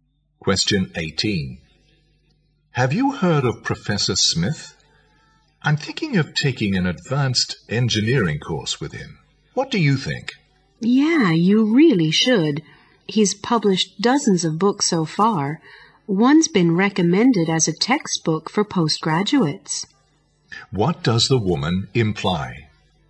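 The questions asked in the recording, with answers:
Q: What does the woman imply?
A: The man should take the course; Professor Smith is a highly accomplished, well-published scholar.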